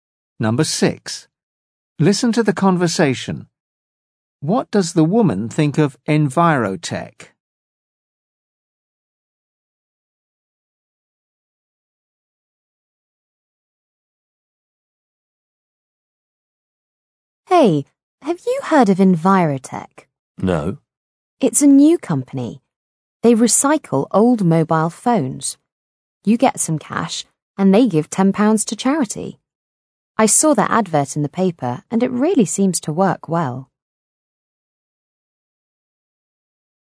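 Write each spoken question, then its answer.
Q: What does the woman think of Envirotech?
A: She thinks it works well.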